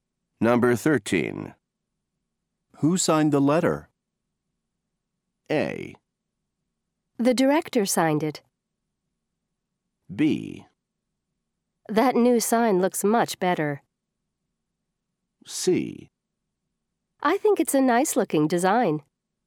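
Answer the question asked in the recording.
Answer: A: The director signed it.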